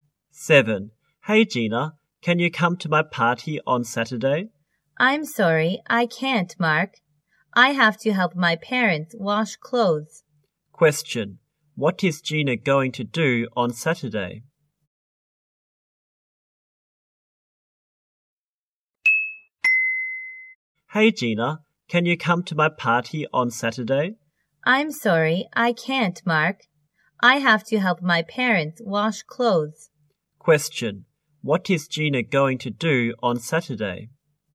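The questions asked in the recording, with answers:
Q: What is Gina going to do on Saturday?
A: Help her parents wash clothes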